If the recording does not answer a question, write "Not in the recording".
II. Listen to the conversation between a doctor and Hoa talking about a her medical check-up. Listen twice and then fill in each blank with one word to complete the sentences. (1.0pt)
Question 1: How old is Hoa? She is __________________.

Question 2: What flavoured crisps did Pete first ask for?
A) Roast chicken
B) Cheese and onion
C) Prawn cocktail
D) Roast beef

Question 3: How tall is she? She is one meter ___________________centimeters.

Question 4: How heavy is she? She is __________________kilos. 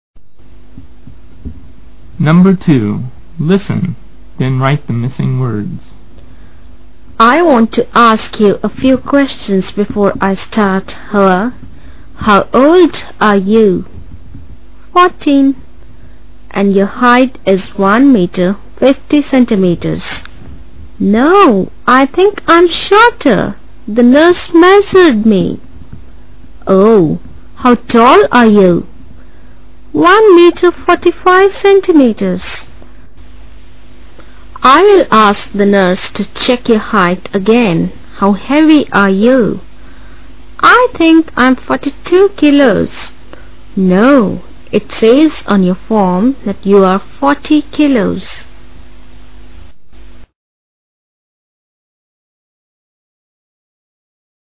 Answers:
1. fourteen (14)
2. Not in the recording
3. 45
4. 40 (forty)

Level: lớp 7